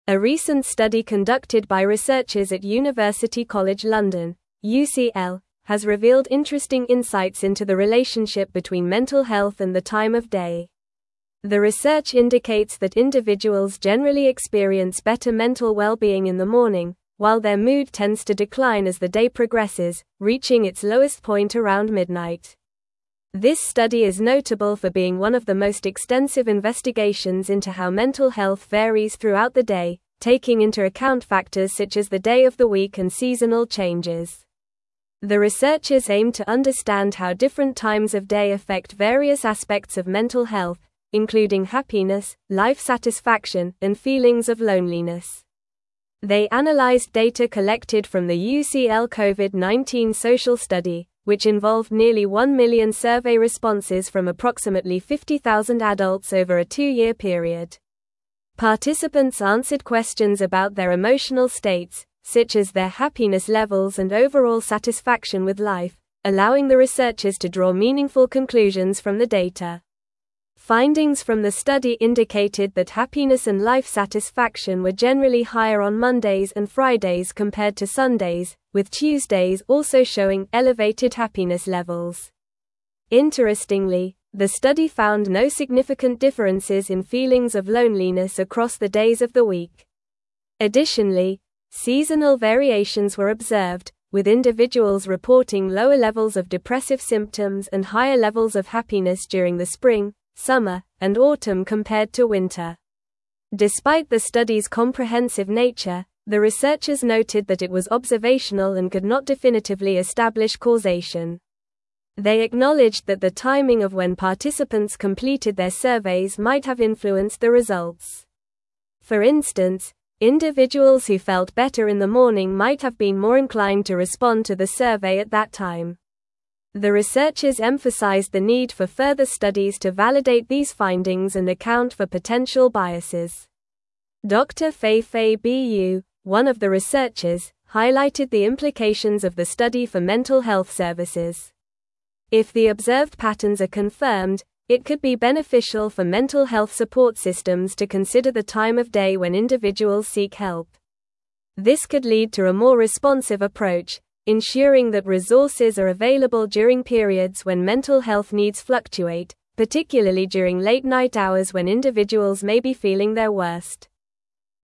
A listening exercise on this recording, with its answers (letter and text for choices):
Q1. The research indicates that individuals generally experience better mental wellbeing in the morning, while their mood tends to decline as the day (1)______, (2)______ its lowest point around midnight.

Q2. The research indicates that individuals generally experience better mental wellbeing in the morning, while their mood tends to decline as the day (1)______, (2)______ its lowest point around midnight.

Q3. This study is (3)______ for being one of the most extensive investigations into how mental health varies throughout the day, taking into account factors such as the day of the week and (4)______ changes.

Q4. This study is (3)______ for being one of the most extensive investigations into how mental health varies throughout the day, taking into account factors such as the day of the week and (4)______ changes.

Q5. They analyzed data collected from the UCL Covid-19 social (5)______, which involved nearly one million survey responses from approximately 50,000 adults over a two-year (6)______.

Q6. They analyzed data collected from the UCL Covid-19 social (5)______, which involved nearly one million survey responses from approximately 50,000 adults over a two-year (6)______.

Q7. Findings from the study indicated that happiness and life satisfaction were generally higher on Mondays and Fridays compared to (7)______, with Tuesdays also showing (8)______ happiness levels.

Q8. Findings from the study indicated that happiness and life satisfaction were generally higher on Mondays and Fridays compared to (7)______, with Tuesdays also showing (8)______ happiness levels.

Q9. Interestingly, the study found no significant differences in (9)______ of loneliness across the days of the week.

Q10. Additionally, seasonal variations were observed, with individuals reporting lower levels of depressive (10)______ and higher levels of happiness during the spring, summer, and autumn compared to winter.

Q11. They acknowledged that the timing of when participants (11)______ their (12)______ might have influenced the results.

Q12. They acknowledged that the timing of when participants (11)______ their (12)______ might have influenced the results.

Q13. For instance, individuals who felt better in the morning might have been more (13)______ to respond to the survey at that time.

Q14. Dr. (14)______ Bu, one of the researchers, highlighted the implications of the study for mental (15)______ services.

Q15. Dr. (14)______ Bu, one of the researchers, highlighted the implications of the study for mental (15)______ services.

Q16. If the observed patterns are confirmed, it could be beneficial for mental health support systems to (16)______ the time of day when individuals seek help.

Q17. What institution conducted the recent study on mental health and time of day?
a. Harvard University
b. Stanford University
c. Massachusetts Institute of Technology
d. University College London (UCL)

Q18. When do individuals generally experience their lowest mood according to the study?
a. Around midnight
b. In the morning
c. At noon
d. In the evening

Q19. How many survey responses were analyzed in the UCL Covid-19 social study?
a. About 500,000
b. Nearly one million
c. Approximately 100,000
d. Over two million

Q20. Which days of the week showed higher happiness and life satisfaction levels?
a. Mondays and Fridays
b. Wednesdays and Thursdays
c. Saturdays and Sundays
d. Tuesdays and Saturdays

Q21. What did the researchers emphasize as a need for future studies?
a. To increase the number of participants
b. To focus solely on loneliness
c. To validate the findings and account for potential biases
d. To reduce the survey duration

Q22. What did Dr. Feifei Bu suggest regarding mental health services?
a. They should only focus on morning hours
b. They should consider the time of day when individuals seek help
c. They should ignore seasonal changes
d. They should limit surveys to weekends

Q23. What aspect of mental health did the researchers analyze in relation to time of day?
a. Physical health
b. Sleep patterns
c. Dietary habits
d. Happiness and life satisfaction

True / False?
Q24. Individuals generally experience better mental wellbeing in the evening compared to earlier in the day.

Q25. Happiness and life satisfaction were found to be lower on Mondays and Fridays than on Sundays.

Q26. The research analyzed nearly one million survey responses from approximately 50,000 adults over a two-year period.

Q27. The researchers noted that the study was observational and could not definitively establish causation.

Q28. A study conducted by researchers at University College London ignored the relationship between mental health and the time of day.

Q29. Dr. Feifei Bu suggested that mental health services could benefit from considering the time of day when individuals seek help.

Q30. The lowest point of mood for individuals typically occurs around midnight.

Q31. The study observed that individuals reported higher levels of depressive symptoms in spring, summer, and autumn compared to winter.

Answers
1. progresses
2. reaching
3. notable
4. seasonal
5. study
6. period
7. Sundays
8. elevated
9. feelings
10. symptoms
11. completed
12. surveys
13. inclined
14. Feifei
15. health
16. consider
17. d. University College London (UCL)
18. a. Around midnight
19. b. Nearly one million
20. a. Mondays and Fridays
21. c. To validate the findings and account for potential biases
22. b. They should consider the time of day when individuals seek help
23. d. Happiness and life satisfaction
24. False
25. False
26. True
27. True
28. False
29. True
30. True
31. False

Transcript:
A recent study conducted by researchers at University College London (UCL) has revealed interesting insights into the relationship between mental health and the time of day. The research indicates that individuals generally experience better mental wellbeing in the morning, while their mood tends to decline as the day progresses, reaching its lowest point around midnight. This study is notable for being one of the most extensive investigations into how mental health varies throughout the day, taking into account factors such as the day of the week and seasonal changes.
The researchers aimed to understand how different times of day affect various aspects of mental health, including happiness, life satisfaction, and feelings of loneliness. They analyzed data collected from the UCL Covid-19 social study, which involved nearly one million survey responses from approximately 50,000 adults over a two-year period. Participants answered questions about their emotional states, such as their happiness levels and overall satisfaction with life, allowing the researchers to draw meaningful conclusions from the data.
Findings from the study indicated that happiness and life satisfaction were generally higher on Mondays and Fridays compared to Sundays, with Tuesdays also showing elevated happiness levels. Interestingly, the study found no significant differences in feelings of loneliness across the days of the week. Additionally, seasonal variations were observed, with individuals reporting lower levels of depressive symptoms and higher levels of happiness during the spring, summer, and autumn compared to winter.
Despite the study's comprehensive nature, the researchers noted that it was observational and could not definitively establish causation. They acknowledged that the timing of when participants completed their surveys might have influenced the results. For instance, individuals who felt better in the morning might have been more inclined to respond to the survey at that time. The researchers emphasized the need for further studies to validate these findings and account for potential biases.
Dr. Feifei Bu, one of the researchers, highlighted the implications of the study for mental health services. If the observed patterns are confirmed, it could be beneficial for mental health support systems to consider the time of day when individuals seek help. This could lead to a more responsive approach, ensuring that resources are available during periods when mental health needs fluctuate, particularly during late-night hours when individuals may be feeling their worst.

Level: Level 4